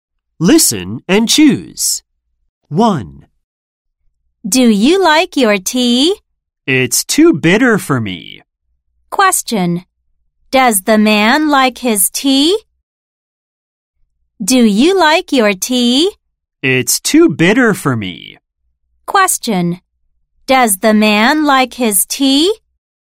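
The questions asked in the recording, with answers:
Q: Does the man like his tea?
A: No, it's too bitter.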